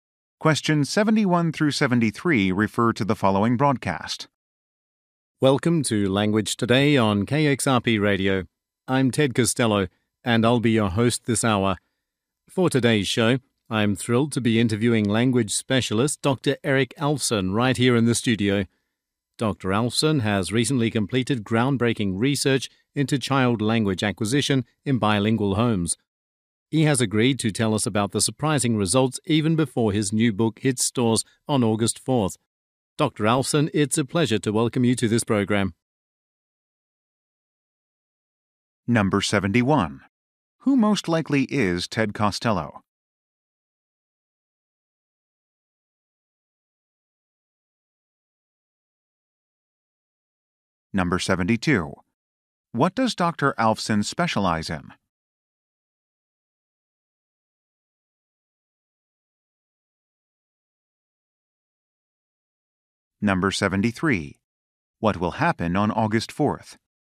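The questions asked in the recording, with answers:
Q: Who most likely is Ted Costello?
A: A radio host

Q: What does Dr. Alfson specialize in?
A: Language (child language acquisition)

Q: What will happen on August 4th?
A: His new book will be released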